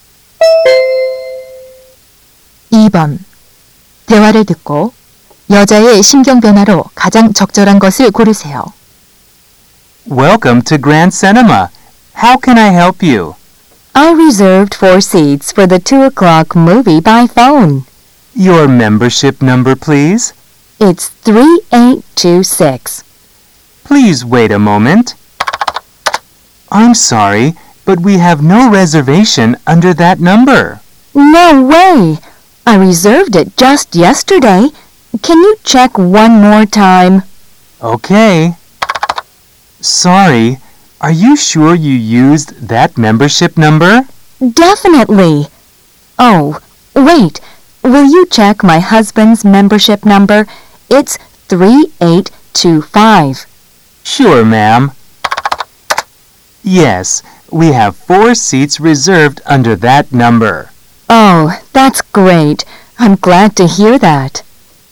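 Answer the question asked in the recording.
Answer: 당황/걱정 → 안도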